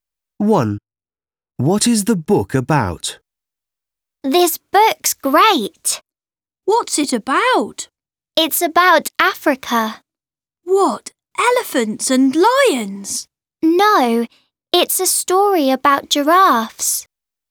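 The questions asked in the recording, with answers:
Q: What is the book about?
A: giraffes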